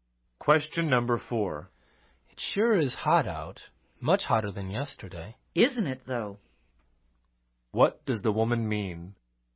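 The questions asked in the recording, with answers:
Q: What does the woman mean?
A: She agrees it is much hotter than yesterday.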